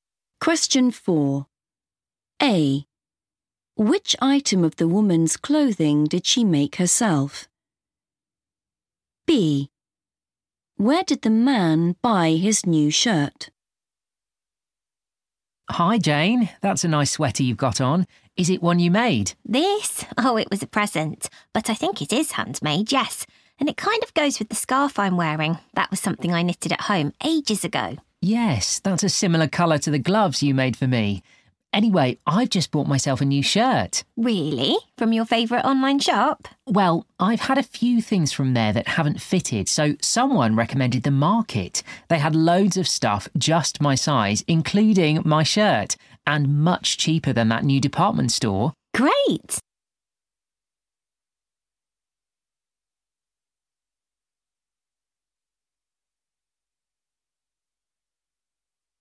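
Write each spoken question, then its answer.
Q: Which item of the woman's clothing did she make herself?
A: the scarf

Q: Where did the man buy his new shirt?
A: The Market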